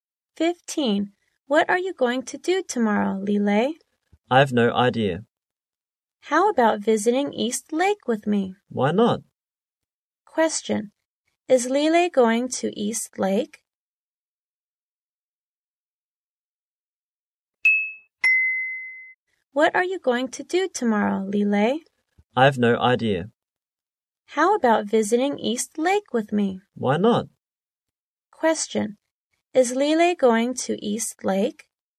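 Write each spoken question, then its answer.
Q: Is Lile going to East Lake?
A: Yes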